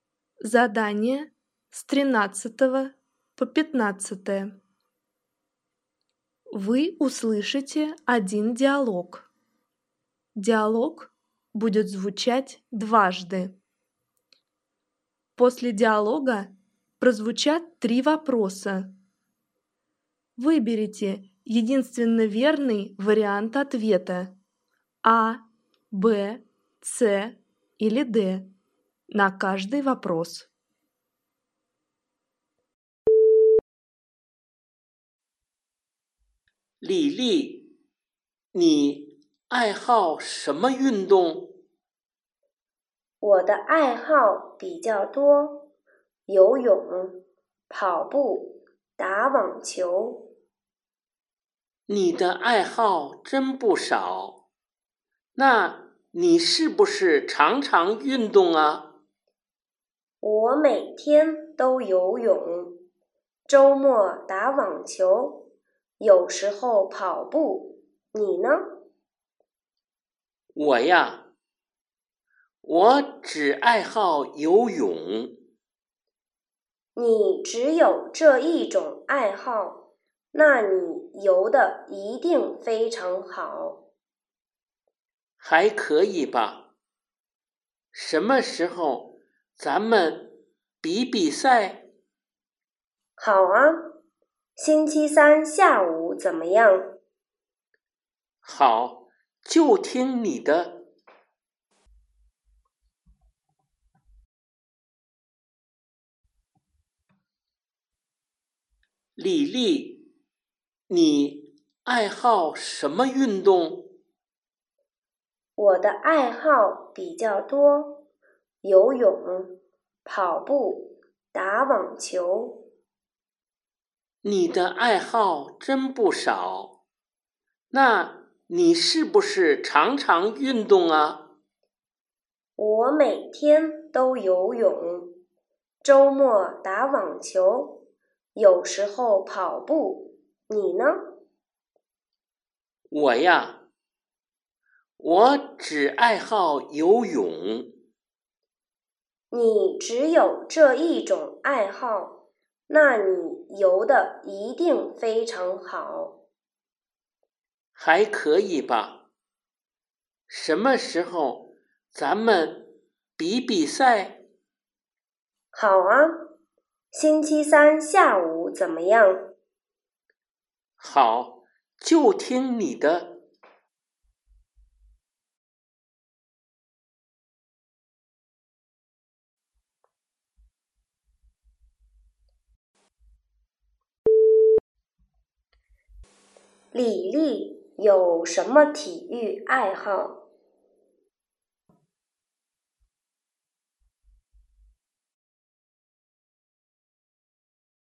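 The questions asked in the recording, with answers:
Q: 李丽有什么体育爱好?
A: 游泳、跑步、打网球

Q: 男的想做什么?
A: 和李丽比赛游泳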